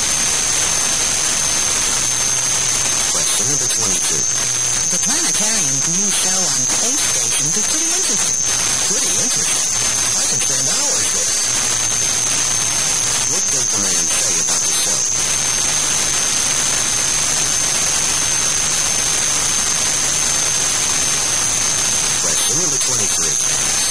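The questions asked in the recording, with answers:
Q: What does the man say about the show?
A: It is very interesting; he could spend hours there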